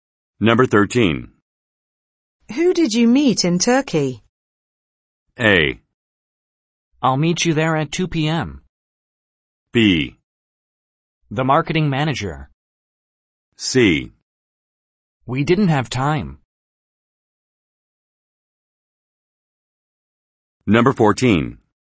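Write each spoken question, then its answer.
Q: Who did you meet in Turkey?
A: B: The marketing manager.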